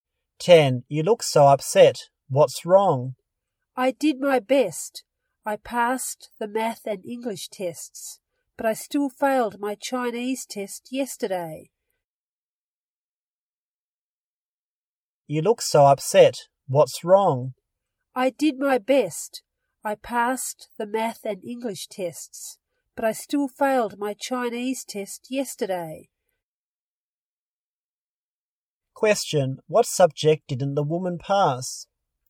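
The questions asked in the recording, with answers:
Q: What subject didn't the woman pass?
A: Chinese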